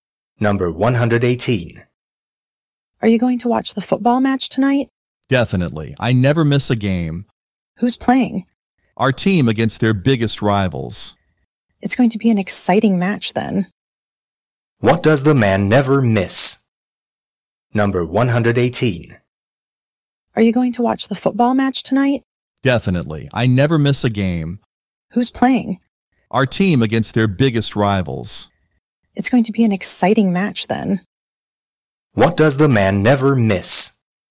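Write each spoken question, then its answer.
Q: What does the man never miss?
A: A football game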